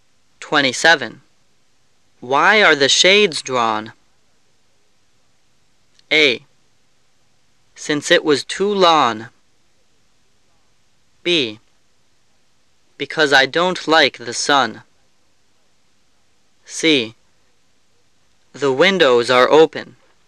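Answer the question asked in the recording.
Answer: B: Because I don't like the sun.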